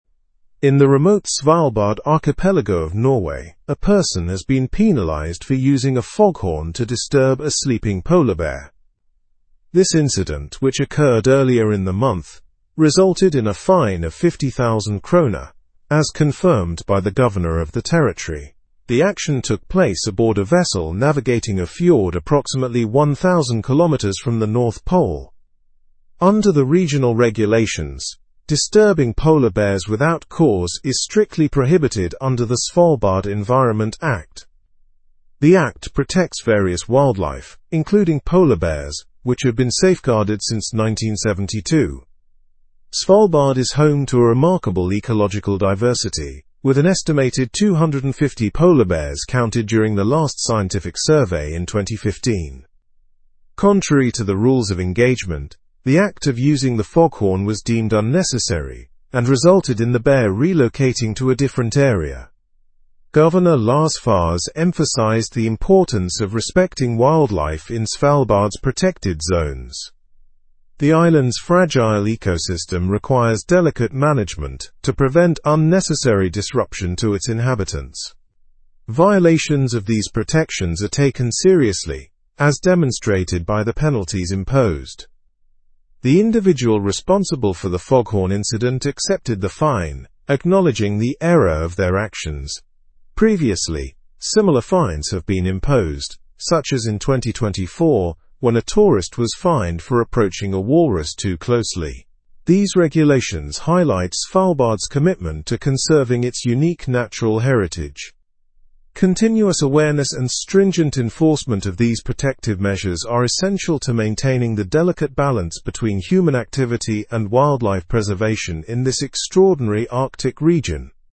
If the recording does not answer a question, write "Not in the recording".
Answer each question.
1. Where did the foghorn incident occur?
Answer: It occurred in the Svalbard archipelago of Norway.

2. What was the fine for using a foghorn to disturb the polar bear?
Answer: The fine was 50,000 kroner.

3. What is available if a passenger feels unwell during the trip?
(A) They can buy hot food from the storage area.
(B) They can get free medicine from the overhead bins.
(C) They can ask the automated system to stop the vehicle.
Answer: Not in the recording

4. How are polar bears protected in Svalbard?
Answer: They are protected under the Svalbard Environment Act.

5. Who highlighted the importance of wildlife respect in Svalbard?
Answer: Governor Lars Fause emphasized this importance.

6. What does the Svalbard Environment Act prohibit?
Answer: It prohibits disturbing polar bears without cause.

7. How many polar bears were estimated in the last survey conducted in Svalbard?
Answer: An estimated 250 polar bears were counted.

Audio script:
In the remote Svalbard archipelago of Norway, a person has been penalized for using a foghorn to disturb a sleeping polar bear. This incident, which occurred earlier in the month, resulted in a fine of 50,000 kroner, as confirmed by the governor of the territory. The action took place aboard a vessel navigating a fjord approximately 1,000 kilometers from the North Pole. Under the regional regulations, disturbing polar bears without cause is strictly prohibited under the Svalbard Environment Act.
The act protects various wildlife, including polar bears, which have been safeguarded since 1972. Svalbard is home to a remarkable ecological diversity, with an estimated 250 polar bears counted during the last scientific survey in 2015. Contrary to the rules of engagement, the act of using the foghorn was deemed unnecessary and resulted in the bear relocating to a different area.
Governor Lars Fause emphasized the importance of respecting wildlife in Svalbard's protected zones. The island's fragile ecosystem requires delicate management to prevent unnecessary disruption to its inhabitants. Violations of these protections are taken seriously, as demonstrated by the penalties imposed.
The individual responsible for the foghorn incident accepted the fine, acknowledging the error of their actions. Previously, similar fines have been imposed, such as in 2024 when a tourist was fined for approaching a walrus too closely. These regulations highlight Svalbard's commitment to conserving its unique natural heritage.
Continuous awareness and stringent enforcement of these protective measures are essential to maintaining the delicate balance between human activity and wildlife preservation in this extraordinary Arctic region.

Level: Level 4